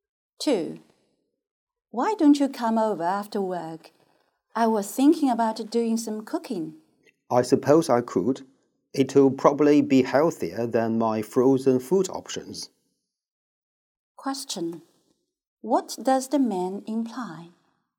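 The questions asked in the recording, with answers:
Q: What does the man imply?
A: He will come over because it will be healthier than his frozen food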